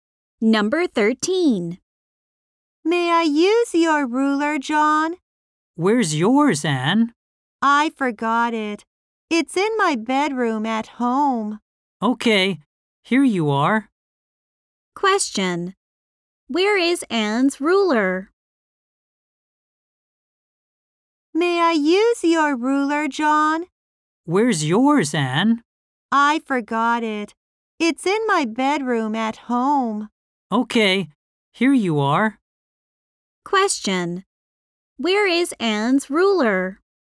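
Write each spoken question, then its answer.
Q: Where is Anne's ruler?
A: In her bedroom at home.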